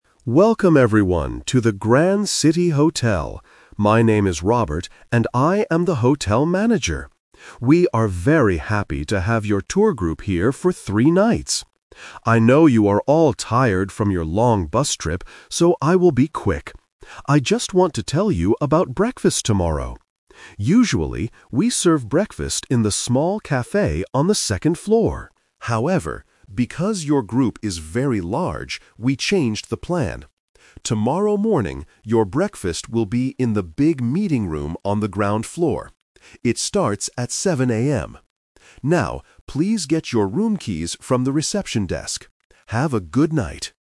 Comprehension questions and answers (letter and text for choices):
Listen to a hotel manager talking to a tour group. Choose the correct answer (A, B, or C) for each question.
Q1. What is the speaker's job?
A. A tour guide.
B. A hotel manager.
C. A bus driver.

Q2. Why is the speaker's speech very short?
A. He is very busy tonight.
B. The guests are tired from their trip.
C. The hotel is closing soon.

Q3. Where will the group eat breakfast tomorrow? (The Twist)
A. In the big meeting room on the ground floor.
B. In the small café on the second floor.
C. In their hotel rooms.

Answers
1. B. A hotel manager.
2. B. The guests are tired from their trip.
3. A. In the big meeting room on the ground floor.

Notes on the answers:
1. The speaker introduces himself clearly: "My name is Robert, and I am the hotel manager." Trap: Option A is a trap because he is talking to a "tour group," but he is not the tour guide. Option C is a trap using the word "bus" mentioned in the audio.
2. He explains why he will be quick: "I know you are all tired from your long bus trip, so I will be quick." Trap: Option A and Option C are plausible reasons for a short speech, but they are not mentioned by the speaker.
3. This is the Twist. He explains that they changed the plan because the group is too big. He says, "...your breakfast will be in the big meeting room on the ground floor." Trap: Option B is a trap because this is where breakfast is usually served, but not for this group tomorrow. Option C is not mentioned at all.

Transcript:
Manager: Welcome everyone to the Grand City Hotel! My name is Robert, and I am the hotel manager. We are very happy to have your tour group here for three nights. I know you are all tired from your long bus trip, so I will be quick. I just want to tell you about breakfast tomorrow. Usually, we serve breakfast in the small café on the second floor. However, because your group is very large, we changed the plan. Tomorrow morning, your breakfast will be in the big meeting room on the ground floor. Now, please get your room keys from the reception desk. Have a good night!